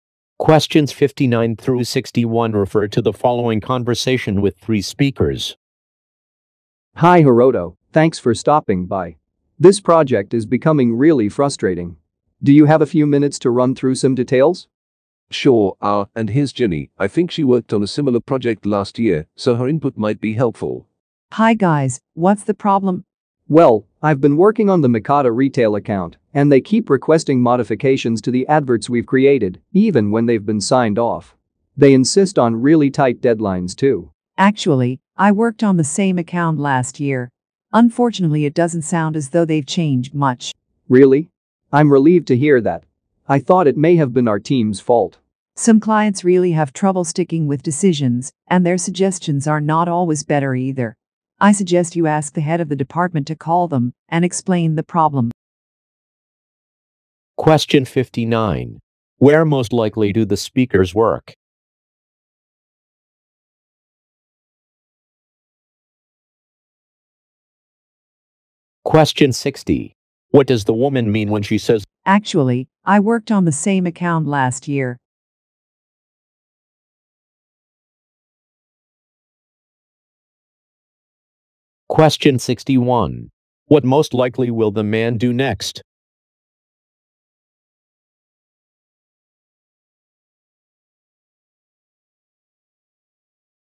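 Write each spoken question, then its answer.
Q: Where most likely do the speakers work?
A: At an advertising agency

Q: What does the woman mean when she says,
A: She has experienced the same difficult client

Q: What most likely will the man do next?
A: Ask the department head to call the client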